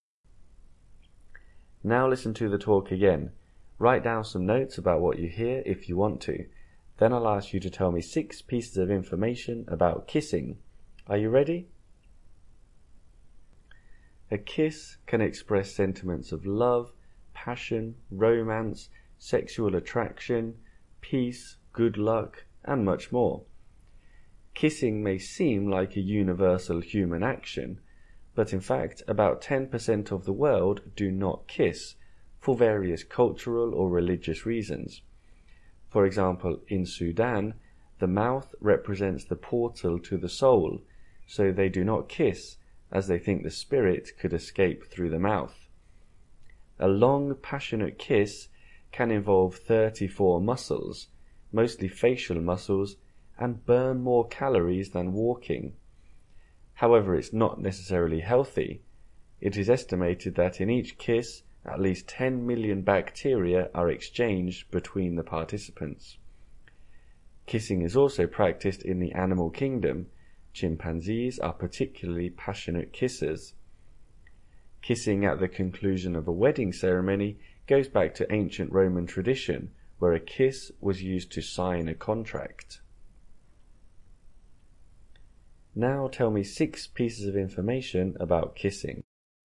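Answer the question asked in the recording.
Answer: About 10% of the world don't kiss; in Sudan they don't kiss because the spirit could escape through the mouth; a passionate kiss uses 34 muscles and burns more calories than walking; at least 10 million bacteria are exchanged per kiss; chimpanzees kiss passionately; the wedding kiss comes from the Roman tradition of signing a contract with a kiss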